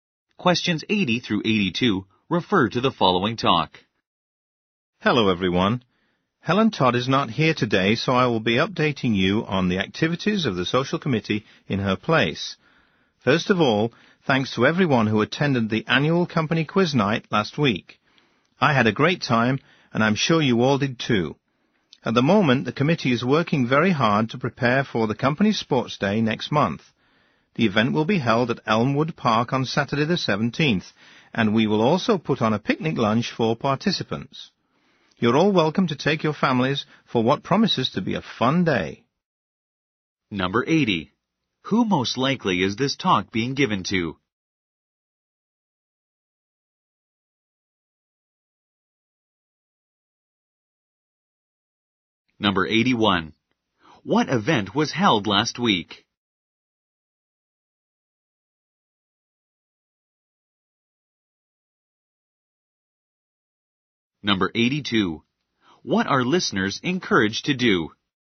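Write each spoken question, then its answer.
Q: Who most likely is this talk being given to?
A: Company employees

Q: What event was held last week?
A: The annual company quiz night

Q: What are listeners encouraged to do?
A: Bring their families to the sports day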